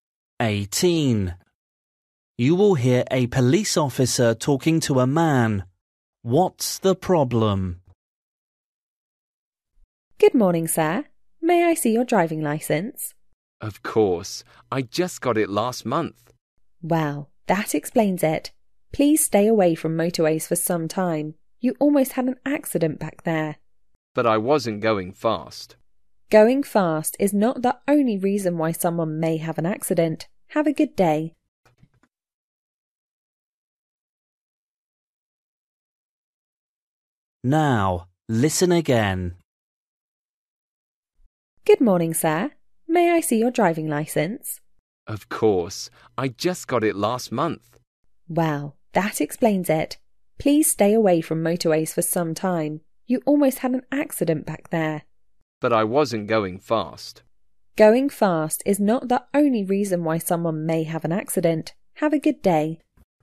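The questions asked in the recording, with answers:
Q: What's the problem?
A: The man is a new driver and almost had an accident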